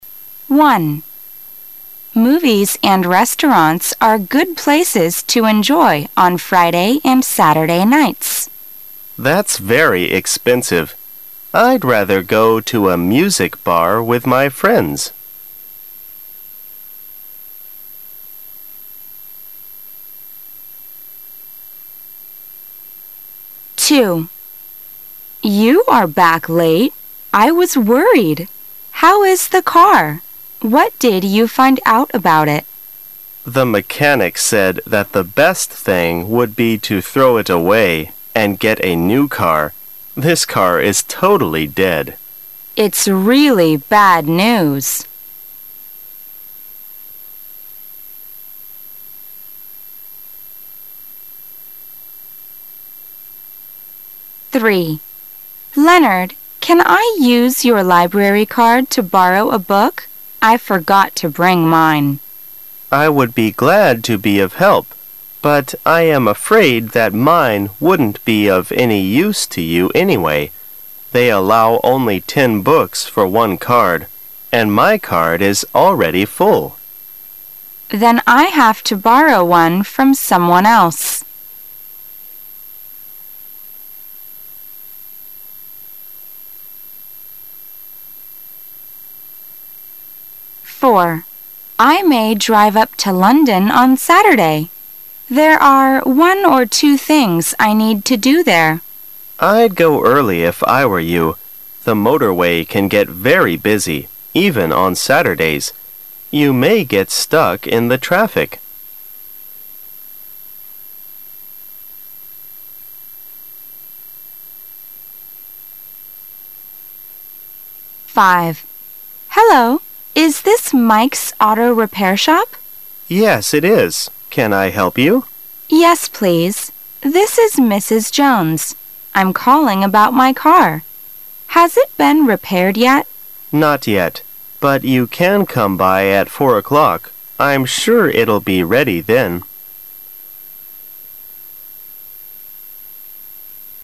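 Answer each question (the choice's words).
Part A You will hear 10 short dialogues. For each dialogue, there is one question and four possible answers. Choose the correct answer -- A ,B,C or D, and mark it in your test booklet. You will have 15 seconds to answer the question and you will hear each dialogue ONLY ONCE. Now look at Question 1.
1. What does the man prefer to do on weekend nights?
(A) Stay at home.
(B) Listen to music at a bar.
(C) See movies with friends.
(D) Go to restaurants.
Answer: Listen to music at a bar.

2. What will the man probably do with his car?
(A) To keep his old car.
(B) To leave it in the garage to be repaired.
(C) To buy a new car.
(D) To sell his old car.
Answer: To buy a new car.

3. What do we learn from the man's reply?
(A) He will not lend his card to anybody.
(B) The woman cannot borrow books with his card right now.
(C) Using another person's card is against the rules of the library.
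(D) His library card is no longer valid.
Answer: The woman cannot borrow books with his card right now.

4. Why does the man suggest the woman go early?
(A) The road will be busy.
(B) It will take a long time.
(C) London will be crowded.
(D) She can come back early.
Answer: The road will be busy.

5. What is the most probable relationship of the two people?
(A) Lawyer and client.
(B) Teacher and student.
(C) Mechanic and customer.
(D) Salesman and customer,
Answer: Mechanic and customer.

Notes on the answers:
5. W: Hello! Is this Mike's Auto Repair Shop? M: Yes, it is. Can I help you? W: Yes, please. This is Mrs. Jones. I'm calling about my car. Has it been repaired yet? M: Not yet. But you can come by at four o'clock. I'm sure it'll be ready then.

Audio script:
[解析] W: You are back late. I was worried. How is the car? What did you find out about it? M: The mechanic said that the best thing would be to throw it away and get a new car. 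This car is totally dead.
[解析] W: Leonard, can I use your library card to borrow a book? I forgot to bring mine. M: I would be glad to be of help. But I am afraid that mine wouldn't be of any use to you anyway. They allow only ten books for one card, and my card is already full. W: Then I have to borrow one from someone else.
A
[解析] W: I may drive up to London on Saturday. There are one or two things I need to do there. M: I'd go early if I were you. The motorway can get very busy, even on Saturdays. You may get stuck in the traffic.
[解析] W: Hello! Is this Mike's Auto Repair Shop? M: Yes, it is. Can I help you? W: Yes, please. This is Mrs. Jones. I'm calling about my car. Has it been repaired yet? M: Not yet. But you can come by at four o'clock. I'm sure it'll be ready then.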